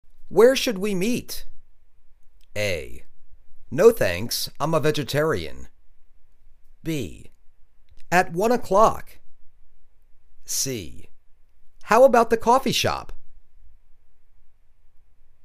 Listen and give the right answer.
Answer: How about the coffee shop?